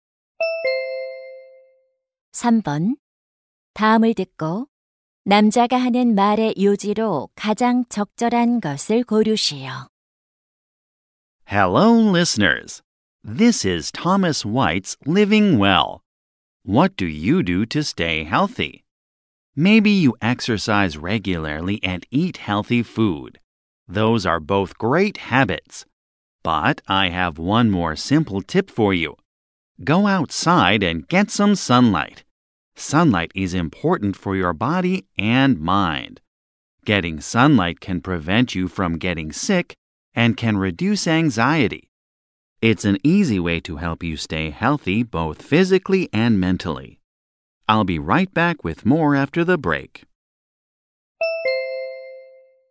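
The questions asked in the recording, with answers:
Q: 다음을 듣고 남자가 하는 말의 요지로 가장 적절한 것을 고르시오.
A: 햇빛을 쬐는 것은 몸과 마음의 건강에 중요하다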